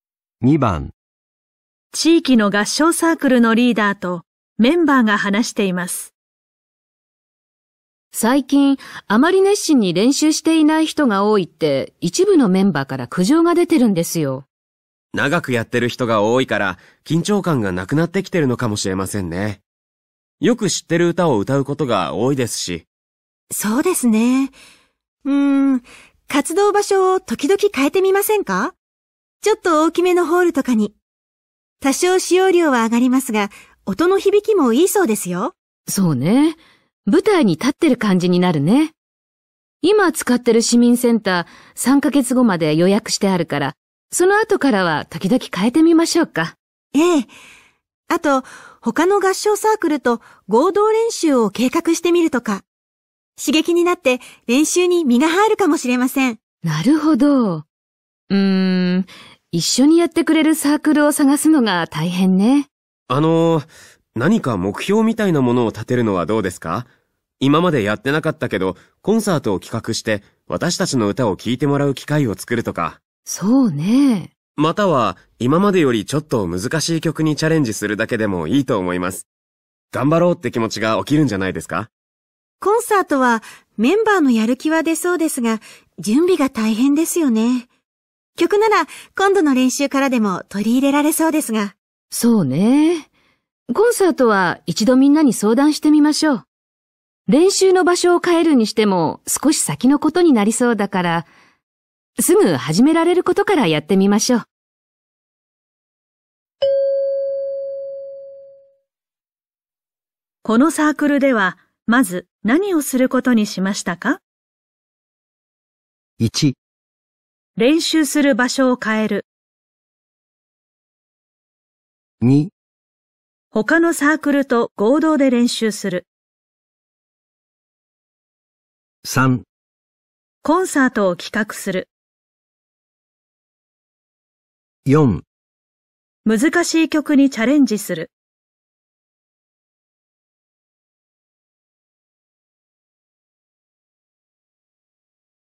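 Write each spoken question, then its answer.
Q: このサークルでは、まず何をすることにしましたか?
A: 4: 難しい曲にチャレンジする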